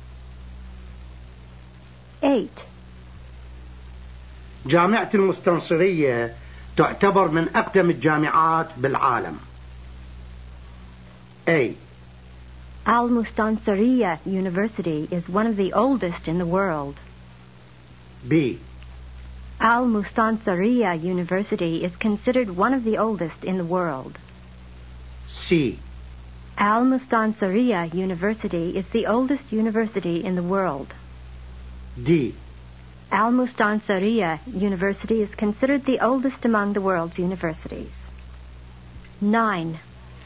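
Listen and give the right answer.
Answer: B: Al-Mustansiriya University is considered one of the oldest in the world.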